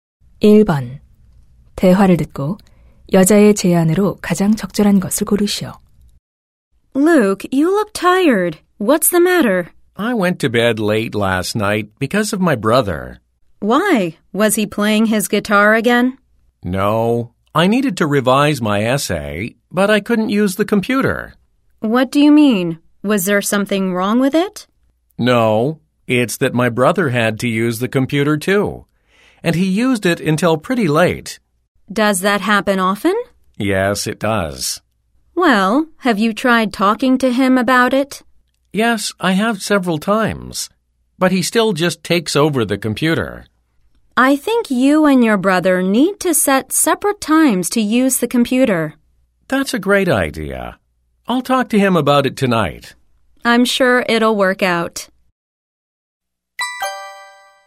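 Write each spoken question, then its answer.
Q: 대화를 듣고 여자의 제안으로 가장 적절한 것을 고르시오.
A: 형제와 컴퓨터 사용 시간을 따로 정해라.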